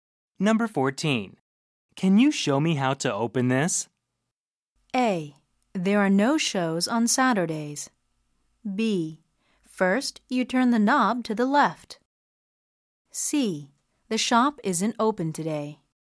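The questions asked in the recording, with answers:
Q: Can you show me how to open this?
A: B: First, you turn the knob to the left.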